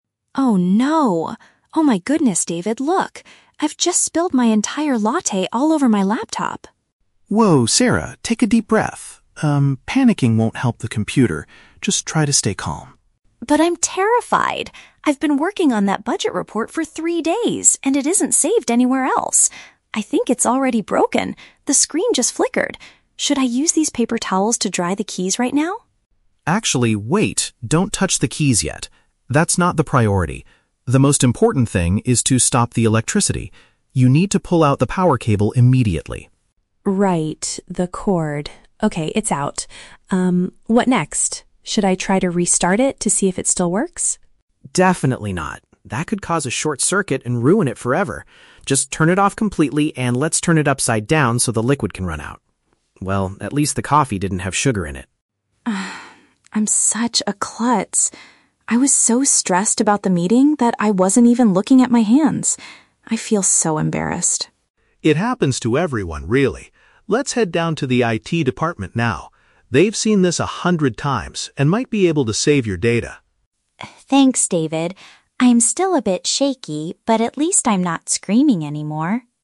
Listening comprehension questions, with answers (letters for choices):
Listen to a conversation between two colleagues, Sarah and David. Choose the correct answer (A, B, or C) for each question.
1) How does Sarah feel at the beginning of the conversation?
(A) Frustrated with David's reaction.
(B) Extremely anxious about her work and device.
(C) Confident that she can fix the problem.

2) What is the very first thing David instructs Sarah to do?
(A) Use paper towels to dry the keyboard.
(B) Restart the laptop to check the screen.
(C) Disconnect the device from the power source.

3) What do the colleagues decide to do at the end?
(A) Go to the meeting and explain the accident.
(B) Seek help from technical experts in the office.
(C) Buy a new laptop because the screen flickered.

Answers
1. B
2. C
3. B

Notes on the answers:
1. Sarah says she is "terrified" because her report isn't saved and her screen is flickering. This matches "extremely anxious." Option (A) is wrong because she is thankful to David, not frustrated. Option (C) is the opposite of her actual feeling.
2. David says "The most important thing is to stop the electricity. You need to pull out the power cable immediately." This is a paraphrase of disconnecting the power. Option (A) was suggested by Sarah but rejected by David ("Don't touch the keys yet"). Option (B) was also rejected by David because it could cause a "short circuit."
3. David suggests going to the "IT department," which is a paraphrase for "technical experts in the office." Option (A) is a distractor because a "meeting" was mentioned as the cause of her stress, but not as their next destination. Option (C) is not mentioned.

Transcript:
Sarah: Oh no! Oh my goodness, David, look! I've just spilled my entire latte all over my laptop!
David: Whoa, Sarah! Take a deep breath. Um, panicking won't help the computer. Just try to stay calm.
Sarah: But I'm terrified! I've been working on that budget report for three days, and it isn't saved anywhere else! I think it's already broken... the screen just flickered! Should I use these paper towels to dry the keys right now?
David: Actually, wait! Don't touch the keys yet. That's not the priority. The most important thing is to stop the electricity. You need to pull out the power cable immediately.
Sarah: Right... the cord. Okay, it's out. Um, what next? Should I try to restart it to see if it still works?
David: Definitely not. That could cause a short circuit and ruin it forever. Just turn it off completely and let's turn it upside down so the liquid can run out. Well, at least the coffee didn't have sugar in it.
Sarah: "I'm such a klutz. I was so stressed about the meeting that I wasn't even looking at my hands. I feel so embarrassed.
David: It happens to everyone, really. Let's head down to the IT department now. They've seen this a hundred times and might be able to save your data.
Sarah: Thanks, David. I'm still a bit shaky, but at least I'm not screaming anymore.